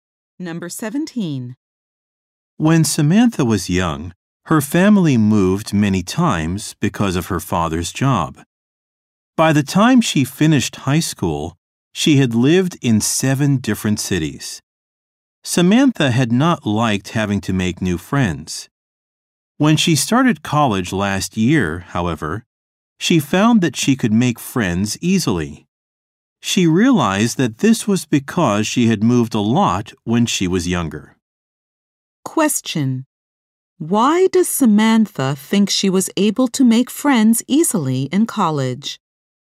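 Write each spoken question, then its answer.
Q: Why does Samantha think she was able to make friends easily in college?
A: Because she had moved a lot when she was younger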